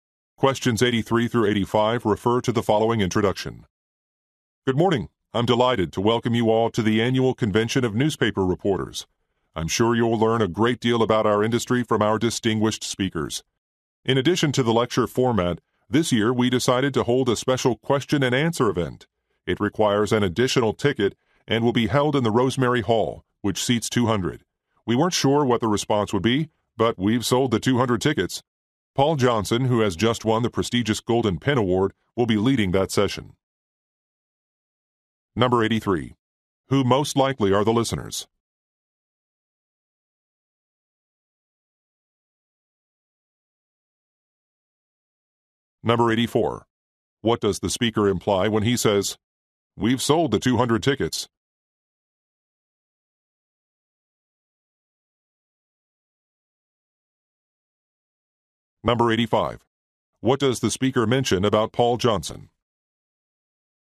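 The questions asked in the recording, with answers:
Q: Who most likely are the listeners?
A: Newspaper reporters

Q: What does the speaker mention about Paul Johnson?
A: He just won the Golden Pen Award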